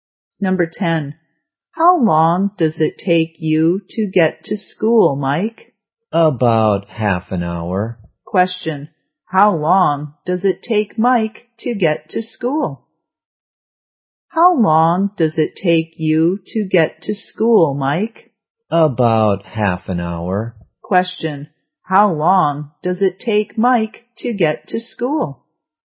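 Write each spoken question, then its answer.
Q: Question, how long does it take Mike to get to school?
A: About half an hour.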